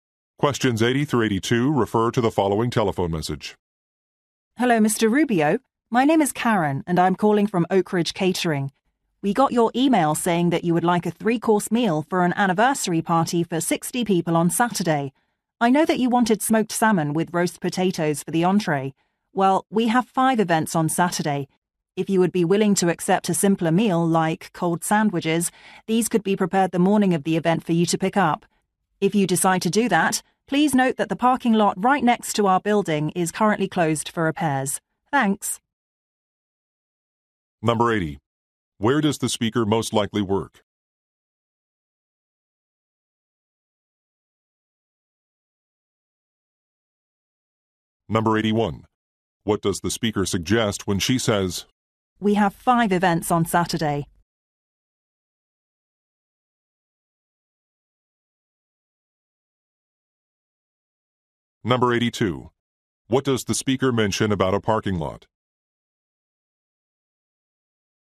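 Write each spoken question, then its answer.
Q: Where does the speaker most likely work?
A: At a catering company

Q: What does the speaker mention about a parking lot?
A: It is closed for repairs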